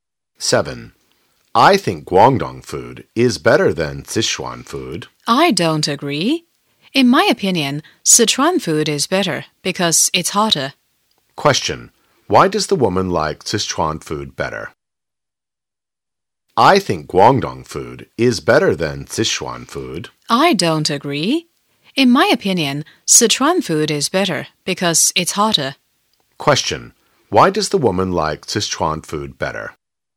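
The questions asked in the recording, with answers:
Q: Why does the woman like Sichuan food better?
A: Because it's hotter.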